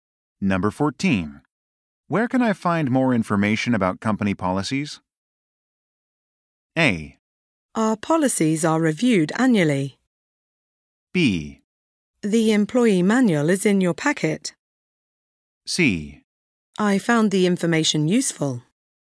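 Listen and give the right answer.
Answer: B: The employee manual is in your packet.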